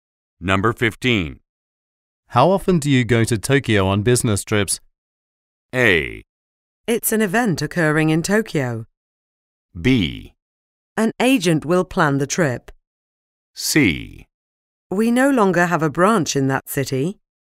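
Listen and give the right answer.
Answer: C: We no longer have a branch in that city.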